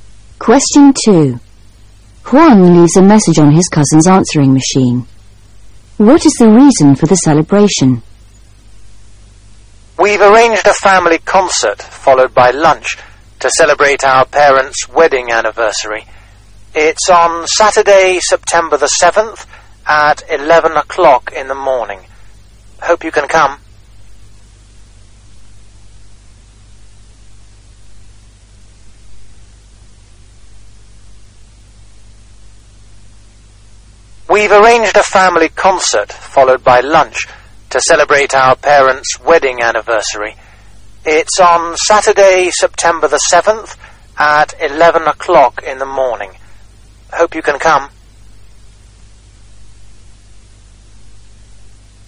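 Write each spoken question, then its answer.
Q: What is the reason for the celebration?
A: Their parents' wedding anniversary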